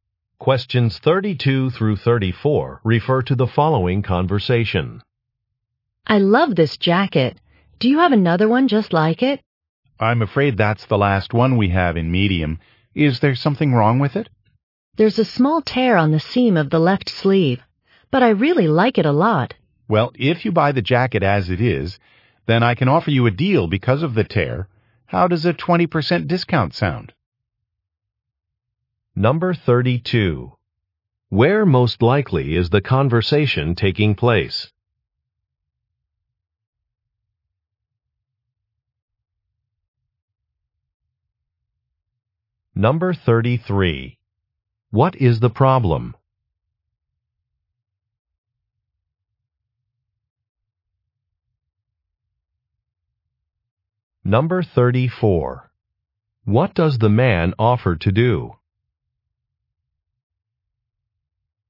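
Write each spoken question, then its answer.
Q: Where most likely is the conversation taking place?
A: In a clothing store

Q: What is the problem?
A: The jacket has a small tear in the left sleeve seam

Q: What does the man offer to do?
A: Give a 20% discount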